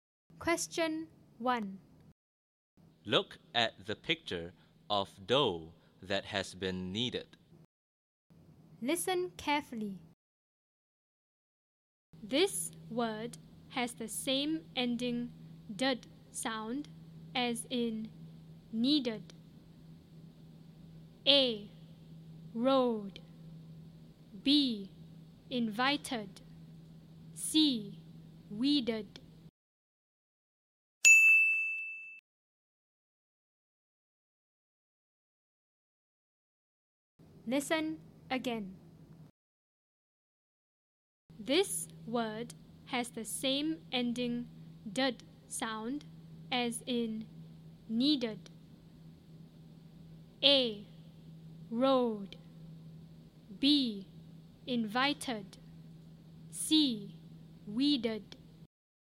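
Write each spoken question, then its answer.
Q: This word has the same ending "dud" sound as in kneaded.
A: C: Weeded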